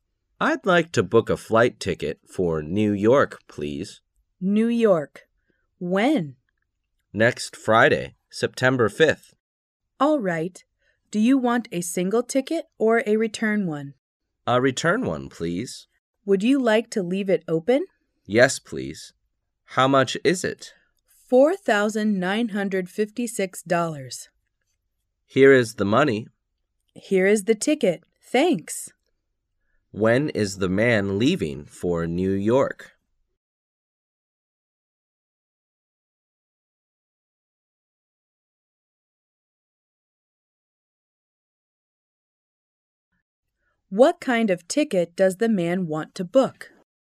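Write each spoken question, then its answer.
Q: When is the man leaving for New York?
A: Next Friday, September 5th

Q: What kind of ticket does the man want to book?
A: An open return ticket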